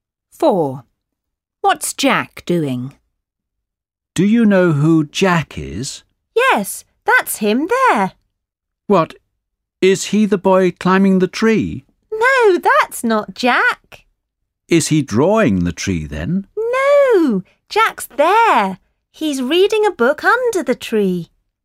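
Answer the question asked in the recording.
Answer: reading a book under the tree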